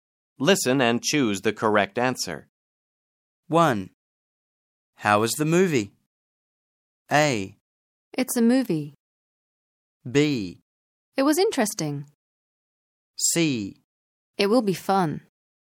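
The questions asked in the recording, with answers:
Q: How was the movie?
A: B: It was interesting.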